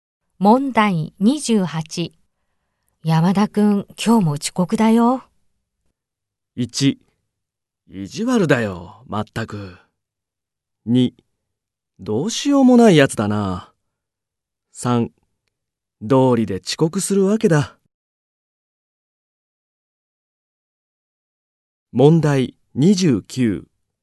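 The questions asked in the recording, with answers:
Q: 山田くん、今日も遅刻だよ。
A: 2: どうしようもないやつだな。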